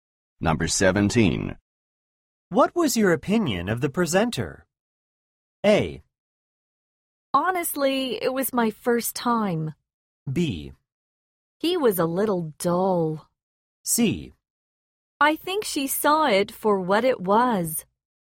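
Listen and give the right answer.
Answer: B: He was a little dull.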